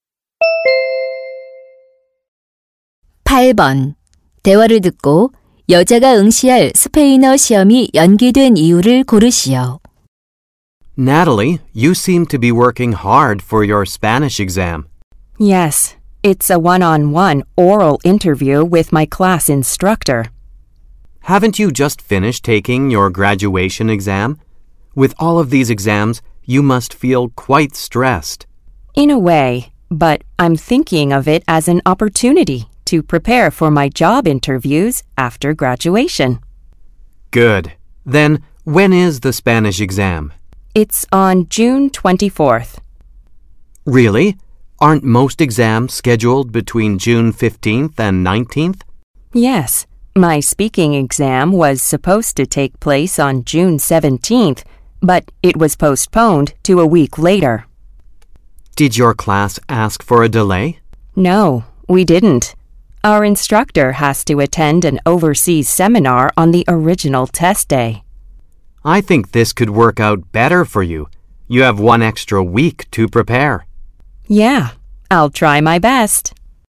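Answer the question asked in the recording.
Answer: 강사가 해외 세미나에 참석해야 해서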